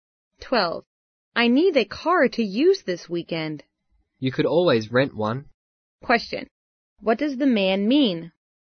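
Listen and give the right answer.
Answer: The woman could rent a car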